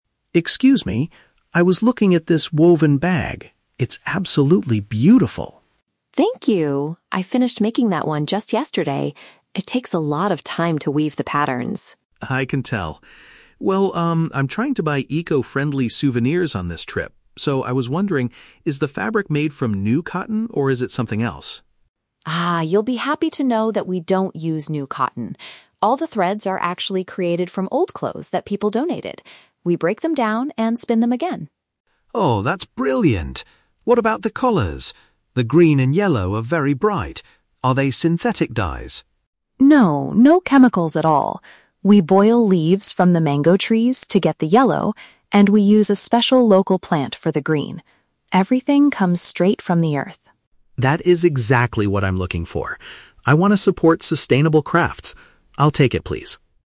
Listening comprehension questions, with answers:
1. What is the tourist primarily concerned about before buying the bag?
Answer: Whether the product is environmentally friendly.

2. What are the threads of the bag made from?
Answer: Used garments that were given away.

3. How does the artisan color her products?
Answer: By boiling natural materials found in the environment.

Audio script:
Mark: Excuse me. I was looking at this woven bag. It's absolutely beautiful.
Rosa: Thank you! I finished making that one just yesterday. It takes a lot of time to weave the patterns.
Mark: I can tell. Well, um, I'm trying to buy eco-friendly souvenirs on this trip. So, I was wondering... is the fabric made from new cotton, or is it something else?
Rosa: Ah, you'll be happy to know that we don't use new cotton. All the threads are actually created from old clothes that people donated. We break them down and spin them again.
Mark: Oh, that's brilliant! What about the colors? The green and yellow are very bright. Are they synthetic dyes?
Rosa: No, no chemicals at all. We boil leaves from the mango trees to get the yellow, and we use a special local plant for the green. Everything comes straight from the earth.
Mark: That is exactly what I'm looking for. I want to support sustainable crafts. I'll take it, please.